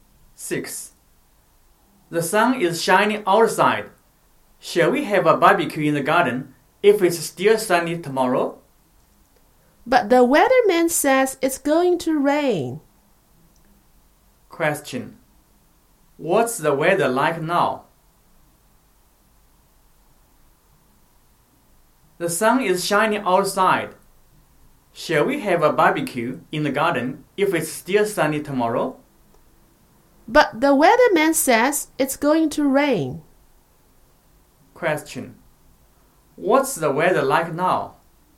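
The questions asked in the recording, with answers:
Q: What's the weather like now?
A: It's sunny.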